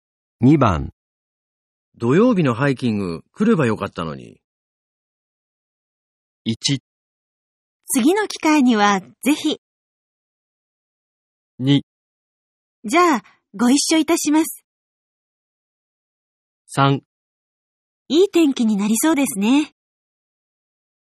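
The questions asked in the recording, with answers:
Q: 土曜日のハイキング来ればよかったのに。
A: 1: 次の機会にはぜひ。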